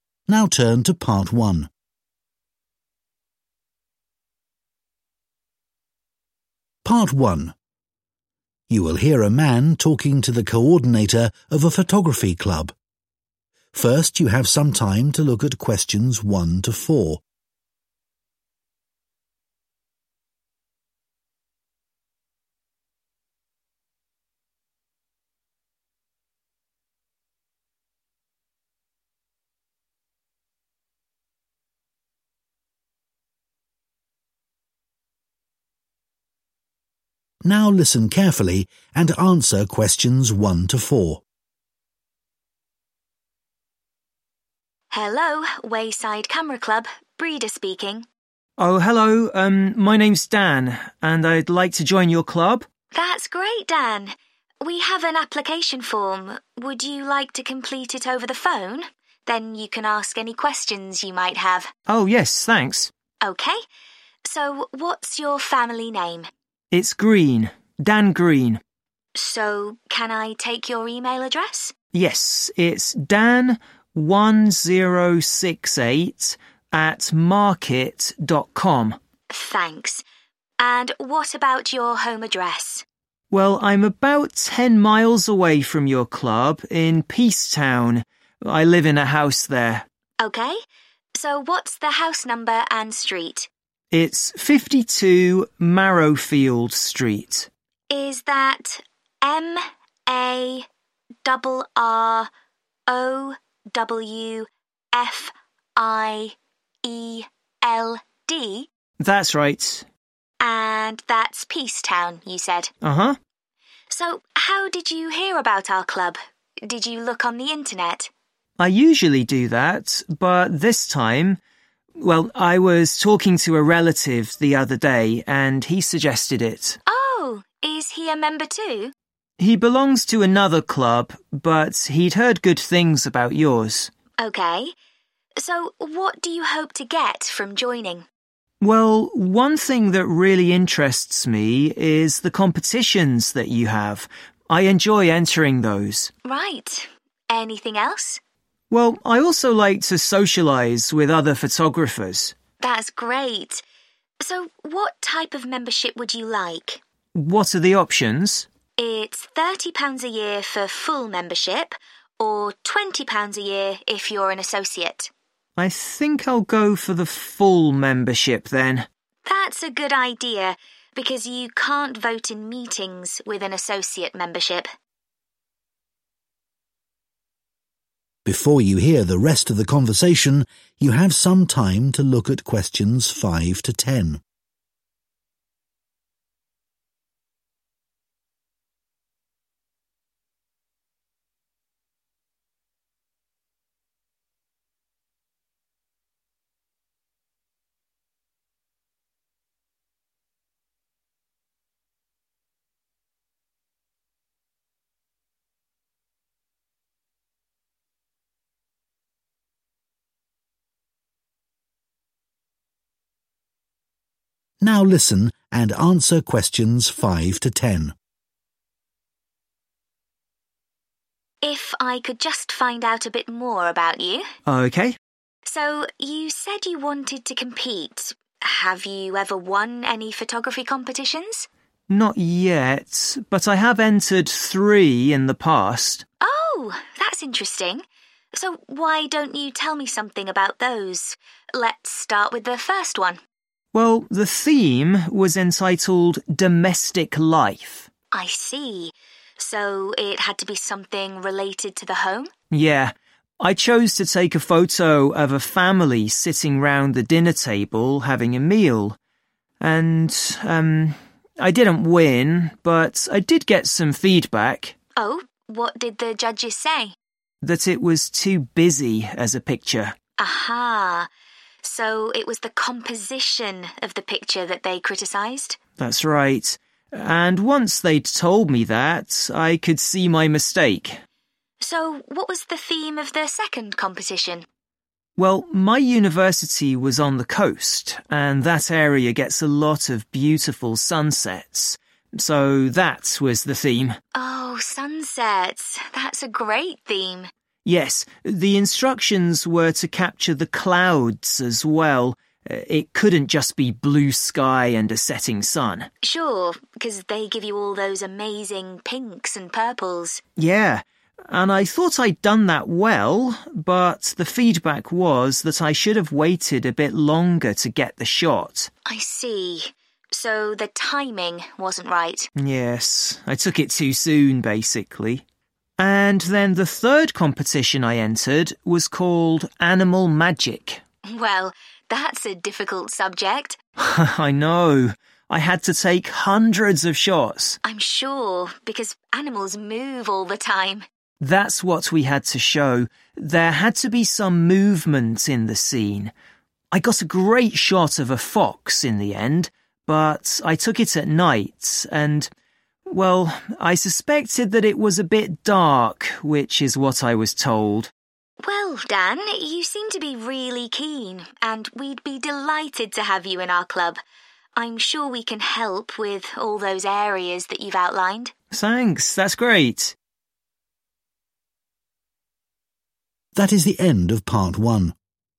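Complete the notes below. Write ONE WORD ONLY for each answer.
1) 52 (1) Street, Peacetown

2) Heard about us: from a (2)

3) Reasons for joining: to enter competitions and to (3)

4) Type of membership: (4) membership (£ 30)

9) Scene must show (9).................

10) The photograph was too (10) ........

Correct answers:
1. Marrowfield
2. relative
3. socialise
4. full
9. movement
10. dark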